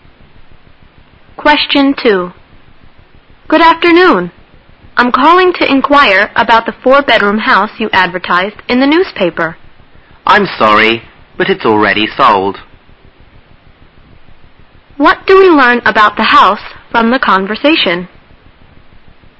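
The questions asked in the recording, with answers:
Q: What do we learn about the house from the conversation?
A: It has already been sold.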